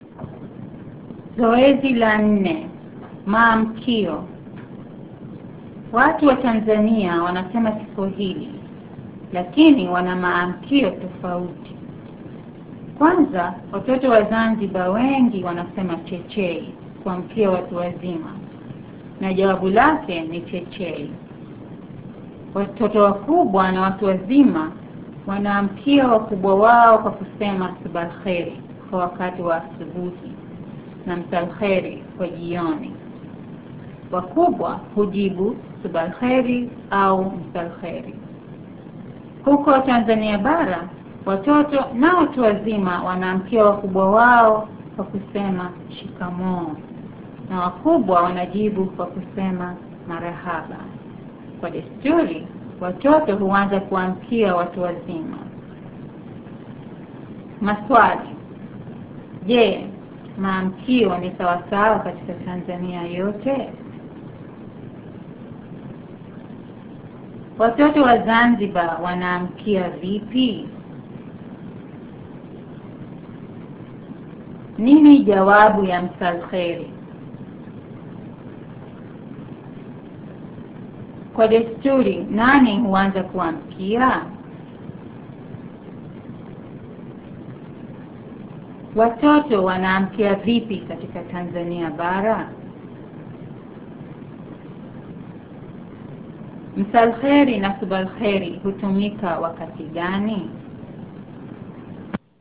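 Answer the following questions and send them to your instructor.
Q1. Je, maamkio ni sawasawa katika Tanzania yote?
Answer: Hapana, wana maamkio tofauti.

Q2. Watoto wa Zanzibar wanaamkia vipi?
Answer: Wanasema 'chechei'.

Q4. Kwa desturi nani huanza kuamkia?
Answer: Watoto.

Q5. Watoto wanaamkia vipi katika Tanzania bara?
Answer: Kwa kusema 'shikamoo'.

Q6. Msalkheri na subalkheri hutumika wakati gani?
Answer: Subalkheri asubuhi na msalkheri jioni.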